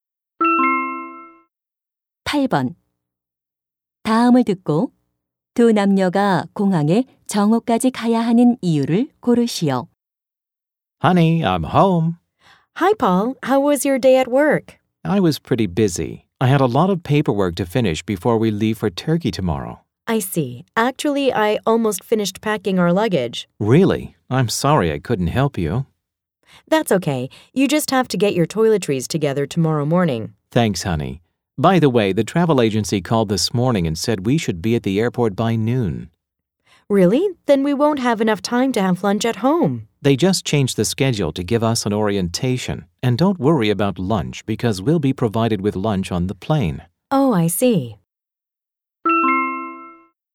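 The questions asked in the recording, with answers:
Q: 다음을 듣고 두 남녀가 공항에 정오까지 가야 하는 이유를 고르시오.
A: 오리엔테이션을 받기 위해서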